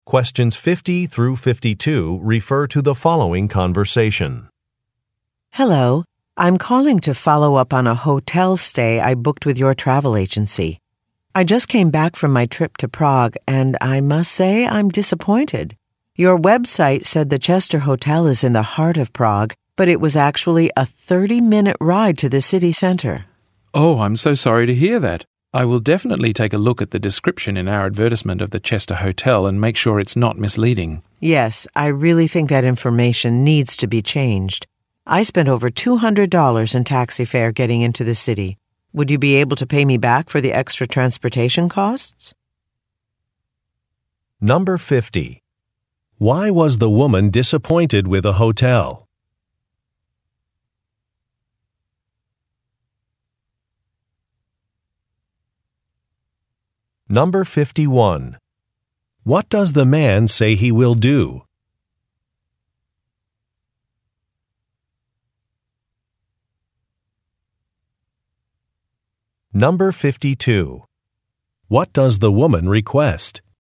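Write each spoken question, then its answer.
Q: Why was the woman disappointed with a hotel?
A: It was far from the city center (a 30-minute ride), not in the heart of Prague as advertised.

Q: What does the man say he will do?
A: Review the hotel's advertisement description to make sure it's not misleading.

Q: What does the woman request?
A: A refund for her extra transportation (taxi) costs.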